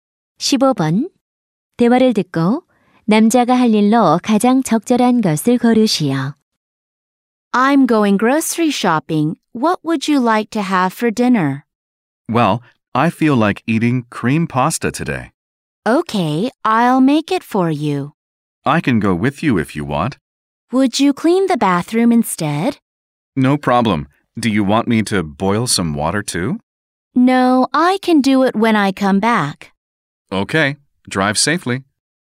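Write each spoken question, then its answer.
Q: 대화를 듣고 남자가 할 일로 가장 적절한 것을 고르시오.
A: 욕실 청소하기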